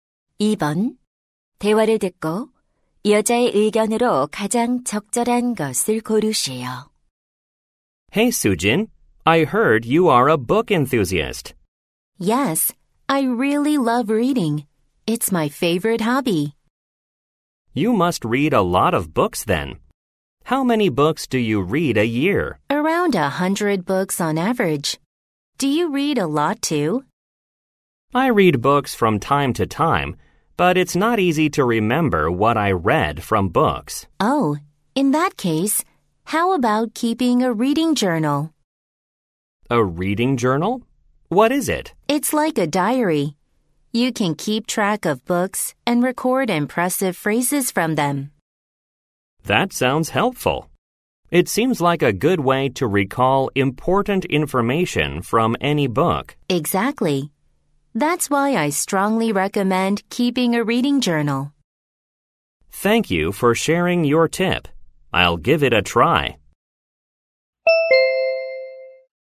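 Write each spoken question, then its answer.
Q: 대화를 듣고 여자의 의견으로 가장 적절한 것을 고르시오.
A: 독서 일지를 쓰는 것이 책 내용을 기억하는 데 도움이 된다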